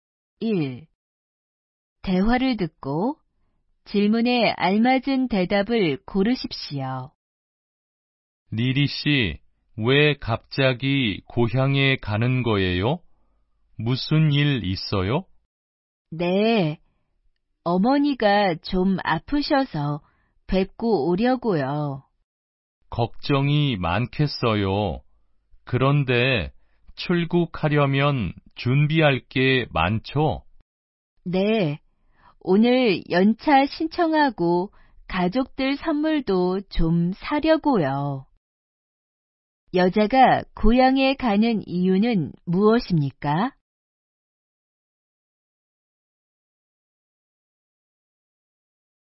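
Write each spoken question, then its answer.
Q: 여자가 고향에 가는 이유는 무엇입니까?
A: 어머니가 아프셔서 뵈러 가려고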